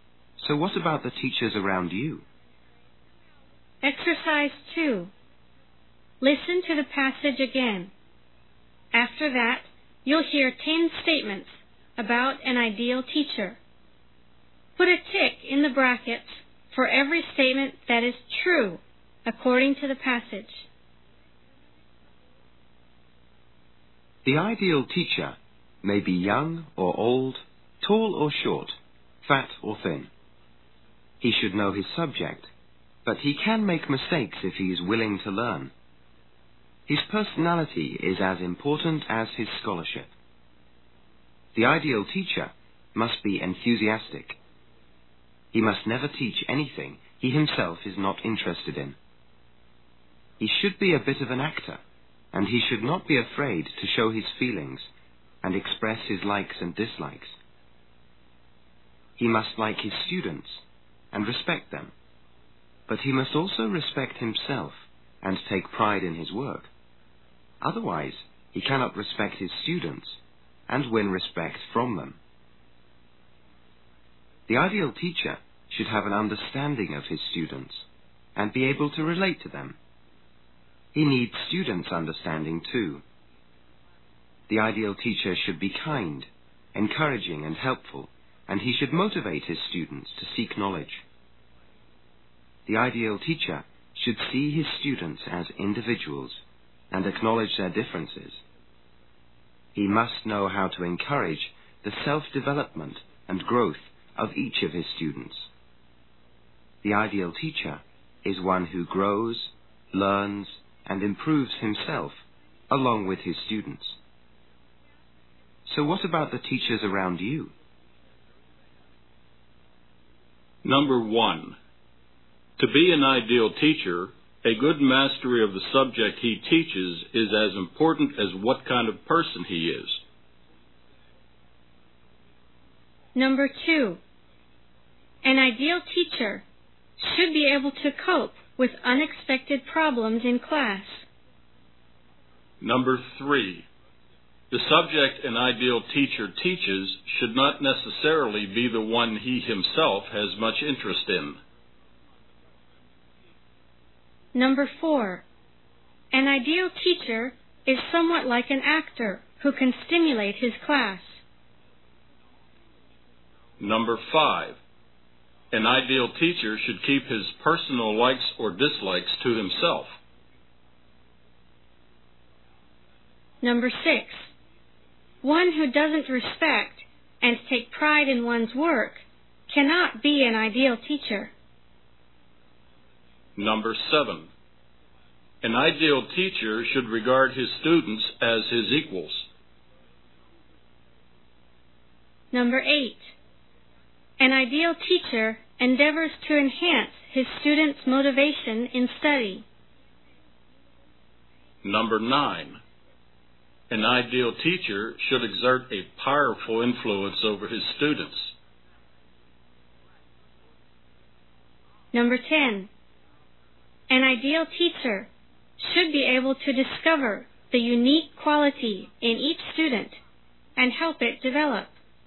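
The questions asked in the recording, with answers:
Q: to be an ideal teacher, a good mastery of the subject he teaches is as important as what kind of person he is.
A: True

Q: the subject an ideal teacher teaches should not necessarily be the one he himself has much interest in.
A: False

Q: an ideal teacher is somewhat like an actor who can stimulate his class.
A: True

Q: an ideal teacher should keep his personal likes or dislikes to himself.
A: False

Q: one who doesn't respect and take pride in one's work cannot be an ideal teacher.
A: True

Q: an ideal teacher endeavors to enhance his students' motivation in study.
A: True

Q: an ideal teacher should be able to discover the unique quality in each student and help it develop.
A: True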